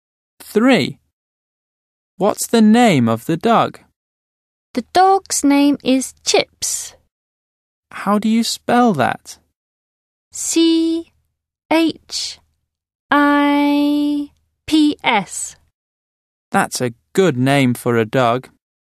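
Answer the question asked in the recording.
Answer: Chips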